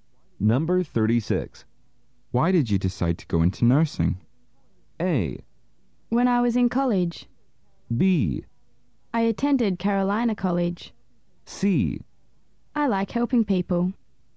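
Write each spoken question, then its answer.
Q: Why did you decide to go into nursing?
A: C: I like helping people.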